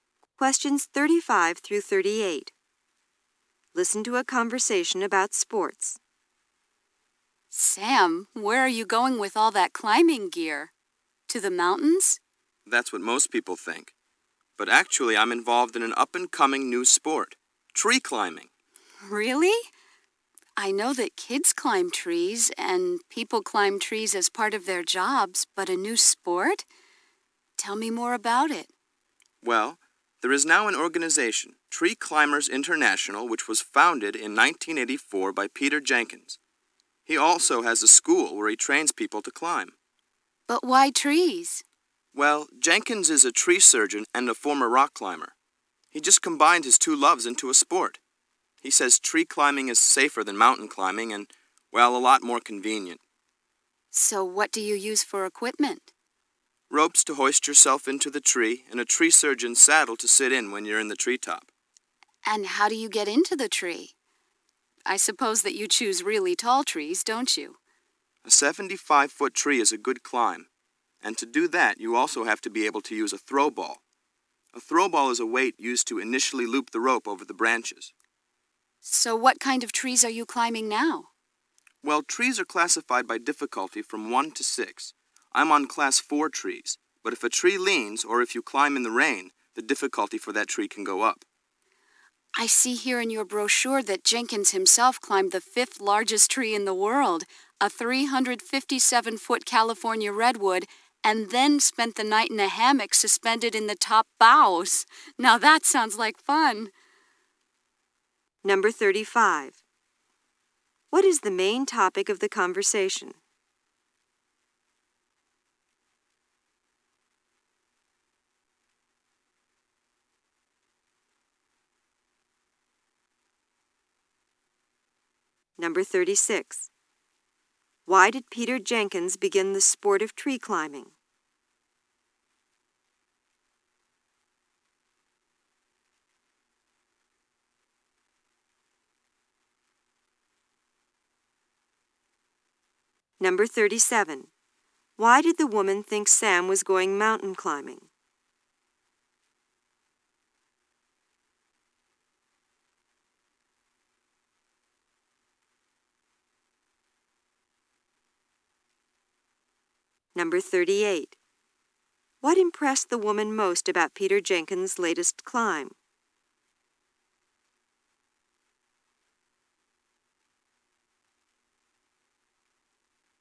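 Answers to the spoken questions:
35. Tree climbing as a sport.
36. He combined his two loves, tree surgery and rock climbing.
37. He was carrying climbing gear.
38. He spent the night in a hammock at the top of a redwood.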